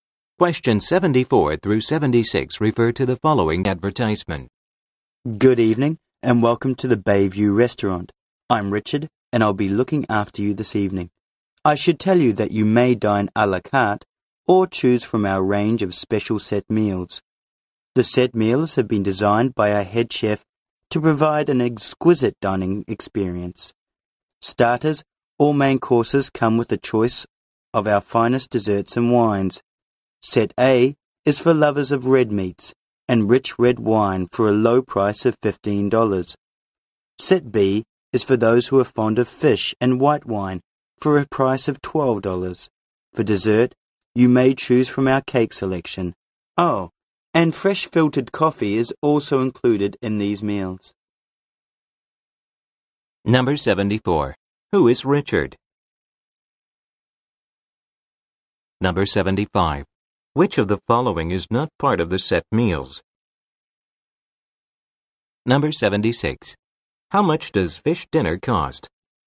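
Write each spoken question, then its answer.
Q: Who is Richard?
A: A waiter at the Bayview Restaurant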